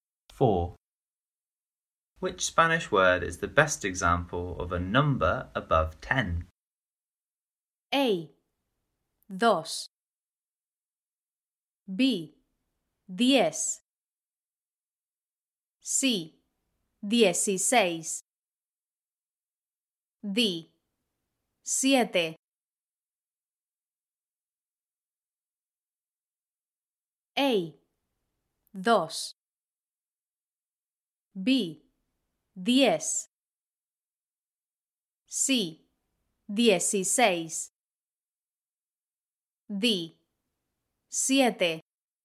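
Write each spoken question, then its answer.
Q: Which Spanish word is the best example of a number above 10?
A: C: Dieciséis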